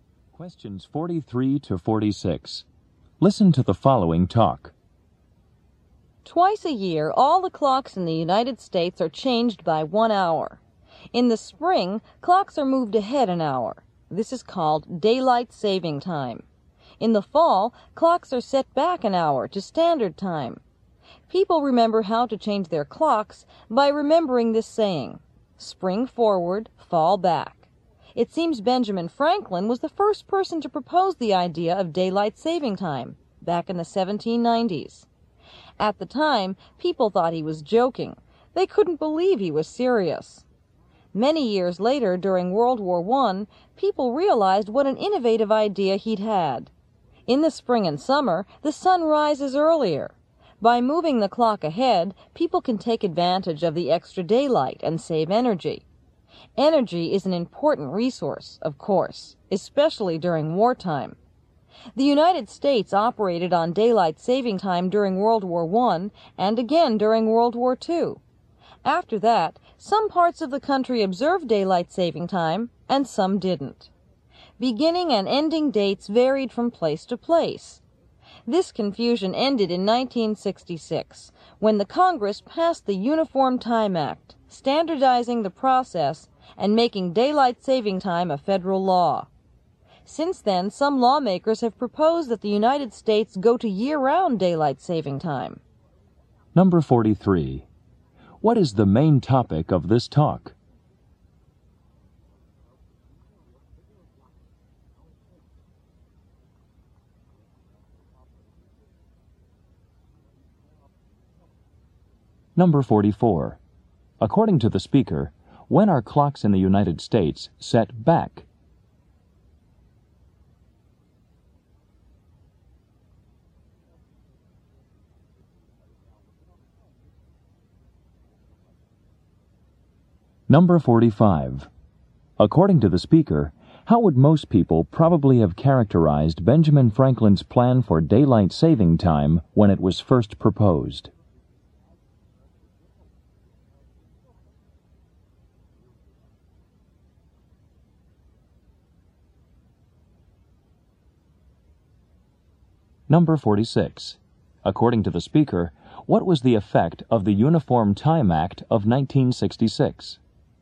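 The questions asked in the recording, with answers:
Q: What is the main topic of this talk?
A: Daylight saving time

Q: According to the speaker, when are clocks in the United States set back?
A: In the fall

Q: According to the speaker, how would most people probably have characterized Benjamin Franklin's plan for daylight saving time when it was first proposed?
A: As a joke

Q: According to the speaker, what was the effect of the Uniform Time Act of 1966?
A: It standardized daylight saving time as federal law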